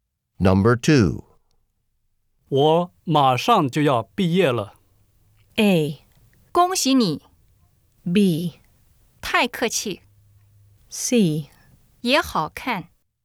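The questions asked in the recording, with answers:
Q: 我马上就要毕业了。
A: A: 恭喜你。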